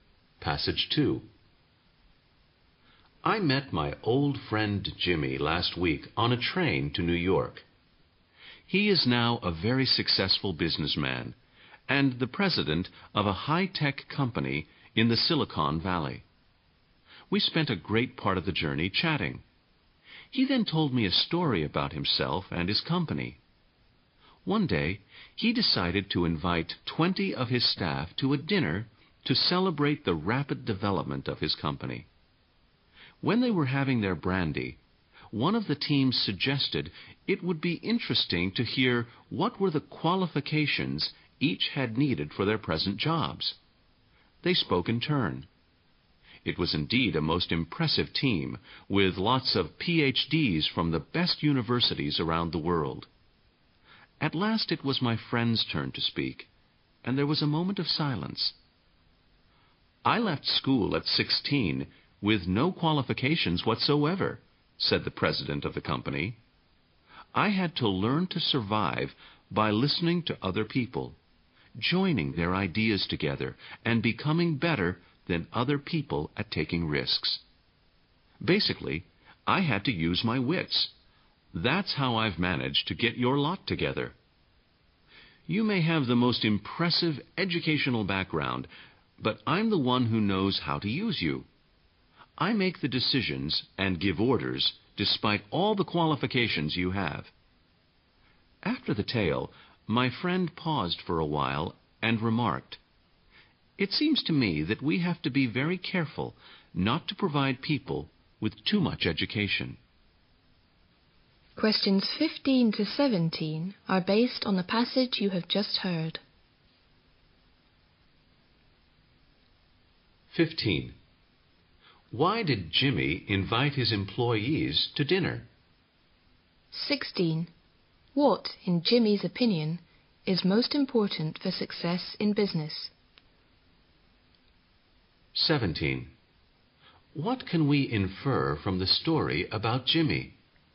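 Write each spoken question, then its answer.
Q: Why did Jimmy invite his employees to dinner?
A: To celebrate the rapid development of his company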